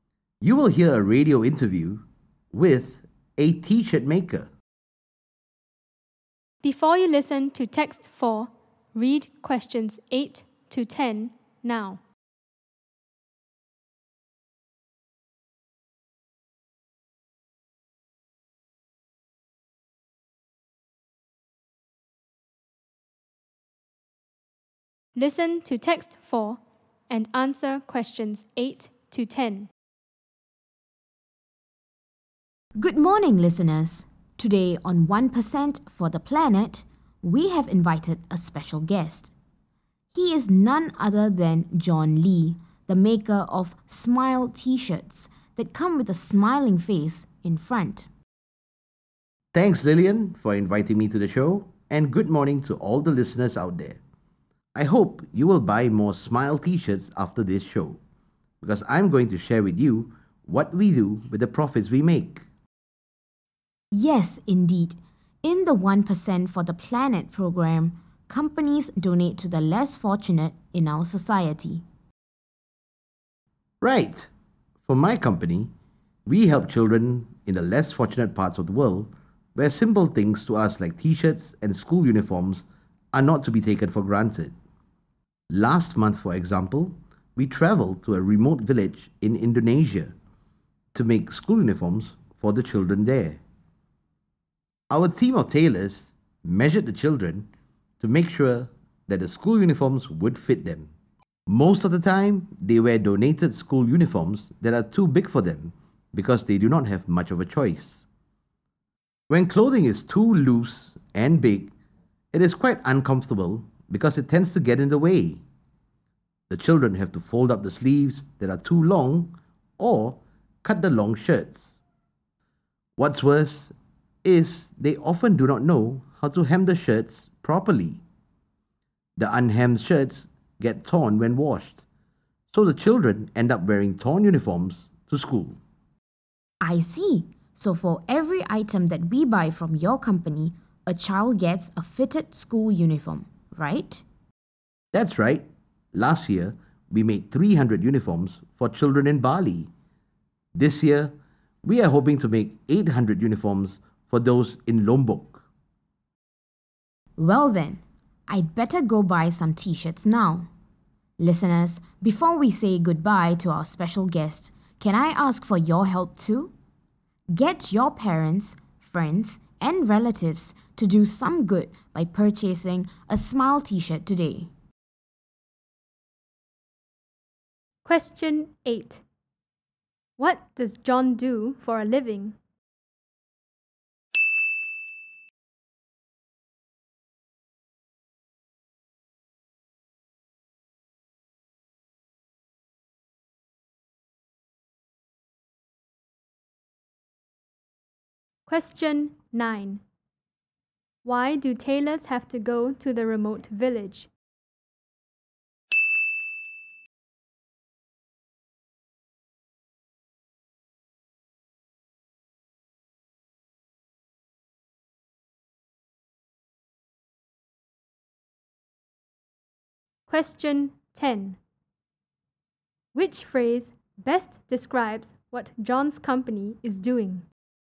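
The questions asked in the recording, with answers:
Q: What does John do for a living?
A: He makes t-shirts (smile t-shirts)

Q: Why do tailors have to go to the remote village?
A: To measure the children so the school uniforms would fit them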